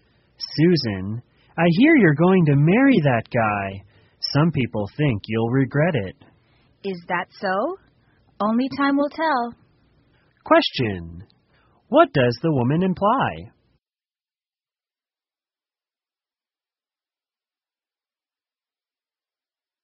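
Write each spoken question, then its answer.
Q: What does the woman imply?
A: Only time will tell whether she will regret marrying him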